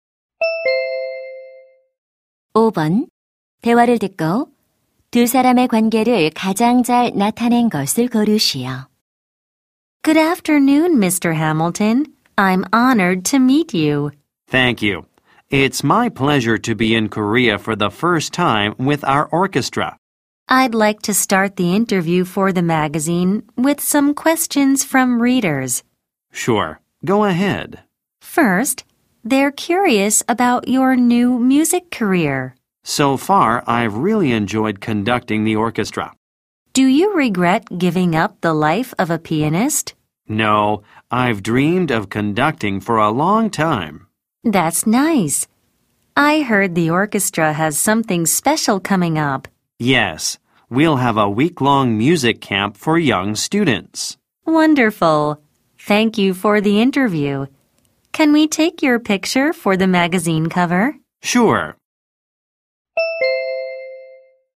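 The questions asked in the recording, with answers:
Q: 대화를 듣고 두 사람의 관계를 가장 잘 나타낸 것을 고르시오.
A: 잡지 기자 - 오케스트라 지휘자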